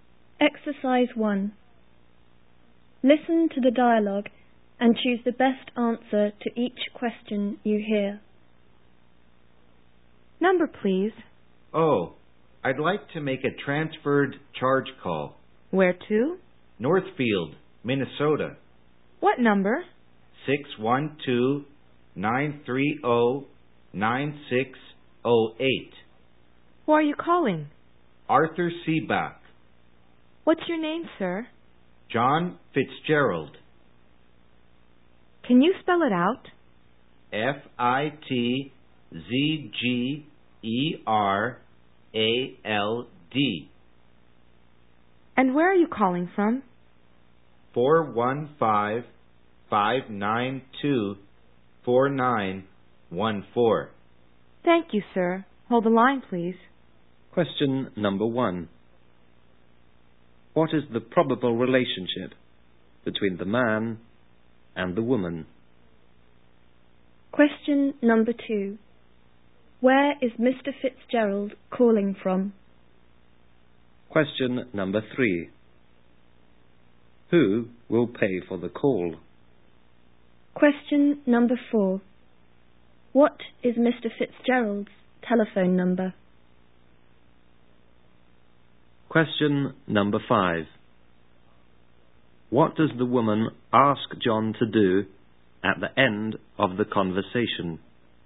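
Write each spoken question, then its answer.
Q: What is the probable relationship between the man and the woman?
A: Caller and telephone operator

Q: Who will pay for the call?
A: Arthur Seebach, the person being called

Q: What is Mr. Fitzgerald's telephone number?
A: 415-592-4914

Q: What does the woman ask John to do at the end of the conversation?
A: Hold the line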